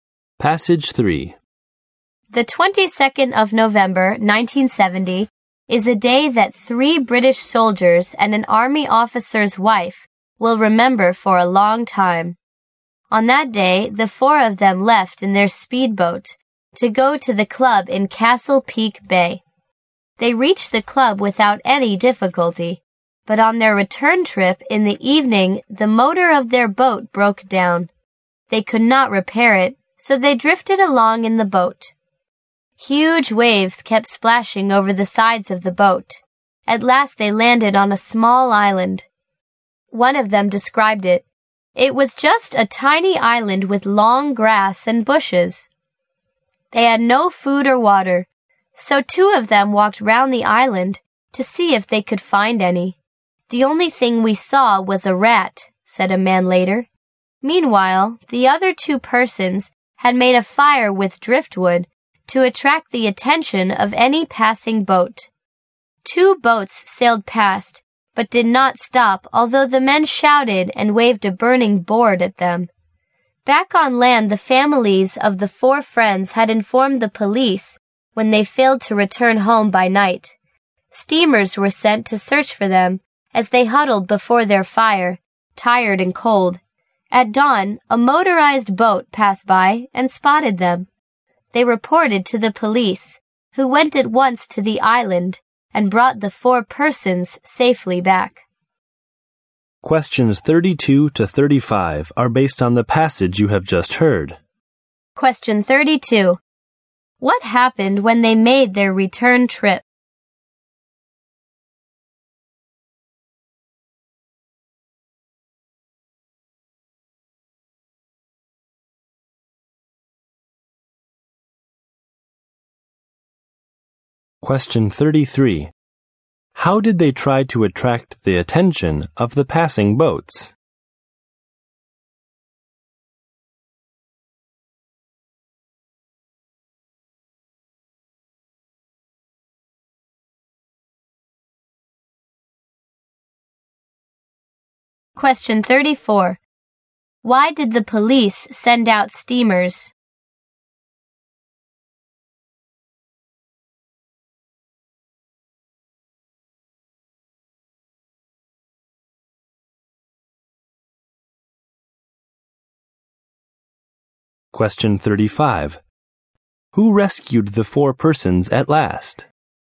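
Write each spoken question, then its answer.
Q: What happened when they made their return trip?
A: The boat's motor broke down

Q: How did they try to attract the attention of the passing boats?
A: They made a fire, shouted and waved a burning board

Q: Why did the police send out steamers?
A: The families reported that the four had not returned home by night

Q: Who rescued the four persons at last?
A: The police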